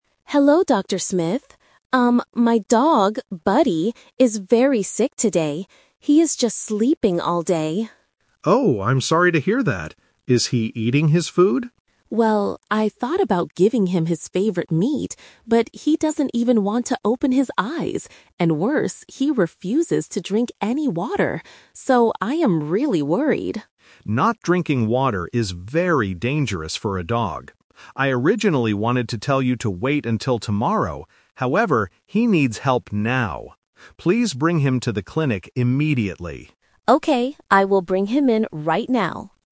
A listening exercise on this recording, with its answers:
Listen to the telephone conversation between a pet owner and a vet, and choose the correct answer (A, B, or C).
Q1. What is the dog doing today?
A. Eating his favorite meat.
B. Sleeping all day.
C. Playing in the yard.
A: B. Sleeping all day.

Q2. What is the dog refusing to do?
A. Drink water.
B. Take his medicine.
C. Go to sleep.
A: A. Drink water.

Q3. When does the vet want to see the dog?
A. Tomorrow morning.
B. Right now.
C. Next week.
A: B. Right now.

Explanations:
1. The owner clearly states at the beginning, "He is just sleeping all day." Option (A) is the trap; the owner thought about giving him his favorite meat, but the dog won't even open his eyes. Option (C) is a distractor and not mentioned.
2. The owner says, "he refuses to drink any water." Option (C) is the trap; the dog is actually doing the opposite (sleeping all day). Option (B) is a plausible guess for a sick pet but is not mentioned in the audio.
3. The vet says, "Please bring him to the clinic immediately," and the owner replies, "I will bring him in right now." Option (A) is the trap; the vet originally wanted to say wait until tomorrow, but changed his mind because the situation is dangerous (The Twist). Option (C) is not mentioned.

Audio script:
Owner: Hello, Dr. Smith. Um, my dog, Buddy, is very sick today. He is just sleeping all day.
Vet: Oh, I'm sorry to hear that. Is he eating his food?
Owner: Well, I thought about giving him his favorite meat, but he doesn't even want to open his eyes. And worse, he refuses to drink any water. So, I am really worried.
Vet: Not drinking water is very dangerous for a dog. I originally wanted to tell you to wait until tomorrow, however, he needs help now. Please bring him to the clinic immediately.
Owner: Okay, I will bring him in right now.

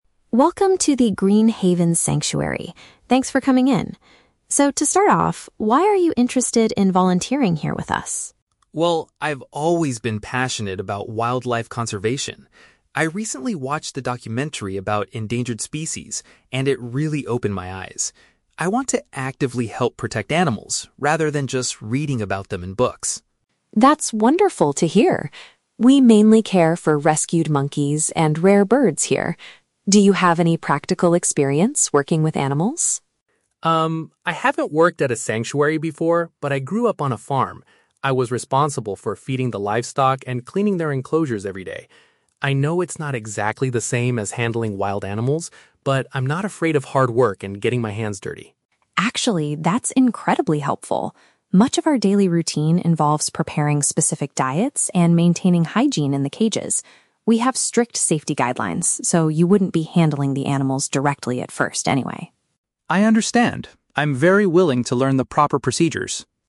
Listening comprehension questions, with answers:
Listen to an interview between a sanctuary manager and a volunteer candidate. Choose the best answer (A, B, or C) for each question.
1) Why does the candidate want to volunteer at the sanctuary?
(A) She needs to complete a university project on conservation.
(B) She wants to take practical action to save animals.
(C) She is required to do so after watching a documentary.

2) What relevant experience does the candidate have?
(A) She has experience taking care of farm animals.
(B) She has worked at a different wildlife sanctuary before.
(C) She knows how to safely hold and treat injured monkeys.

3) According to the manager, what will be a major part of the volunteer's job?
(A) Teaching visitors about the rare birds at the sanctuary.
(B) Playing directly with the animals to keep them active.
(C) Making meals and keeping the animal areas clean.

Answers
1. (B) She wants to take practical action to save animals.
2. (A) She has experience taking care of farm animals.
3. (C) Making meals and keeping the animal areas clean.

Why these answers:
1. The candidate says she wants to "actively help protect animals". Option B paraphrases this as taking "practical action to save animals".
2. The candidate says she "grew up on a farm" and was responsible for "feeding the livestock". Option A paraphrases this as taking care of "farm animals".
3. The manager says the daily routine involves "preparing specific diets and maintaining hygiene in the cages." Option C uses synonyms: "making meals" (preparing diets) and "keeping the animal areas clean" (maintaining hygiene).

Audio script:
Manager: Welcome to the Green Haven Sanctuary. Thanks for coming in. So, to start off, why are you interested in volunteering here with us?
Candidate: Well, I've always been passionate about wildlife conservation. I recently watched a documentary about endangered species, and it really opened my eyes. I want to actively help protect animals, rather than just reading about them in books.
Manager: That's wonderful to hear. We mainly care for rescued monkeys and rare birds here. Do you have any practical experience working with animals?
Candidate: Um, I haven't worked at a sanctuary before, but I grew up on a farm. I was responsible for feeding the livestock and cleaning their enclosures every day. I know it's not exactly the same as handling wild animals, but I'm not afraid of hard work and getting my hands dirty.
Manager: Actually, that's incredibly helpful. Much of our daily routine involves preparing specific diets and maintaining hygiene in the cages. We have strict safety guidelines, so you wouldn't be handling the animals directly at first anyway.
Candidate: I understand. I'm very willing to learn the proper procedures.

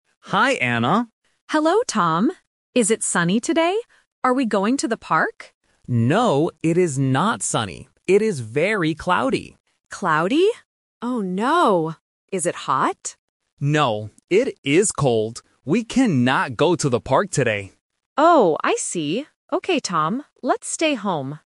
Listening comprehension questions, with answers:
Listen to the conversation. Circle the correct answer (A, B, or C).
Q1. Where does Anna ask to go?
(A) The park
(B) The zoo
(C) Home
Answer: (A) The park

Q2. What is the weather like today?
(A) Sunny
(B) Cloudy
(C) Windy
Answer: (B) Cloudy

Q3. What will Tom and Anna do today?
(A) Go to the park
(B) Stay home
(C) Go to the cafe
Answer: (B) Stay home

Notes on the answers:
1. The Key: Anna clearly asks, "Are we going to the park?" The Trap: Option (C) "Home" is mentioned at the end of the conversation ("Let's stay home"), but it is not where she originally asked to go. Not Mentioned: Option (B) "The zoo" is never mentioned.
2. The Key: Tom says, "It is very cloudy." The Trap: Option (A) "Sunny" is mentioned by Anna in her question ("Is it sunny today?"), but Tom rejects it by saying "No, it is not sunny." Not Mentioned: Option (C) "Windy" is not in the audio.
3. The Key: Anna says, "Let's stay home," agreeing that they cannot go out. The Trap: Option (A) "Go to the park" is their original plan, but Tom says "We cannot go to the park today" because it is cold. Not Mentioned: Option (C) "Go to the cafe" is completely new information.

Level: A1

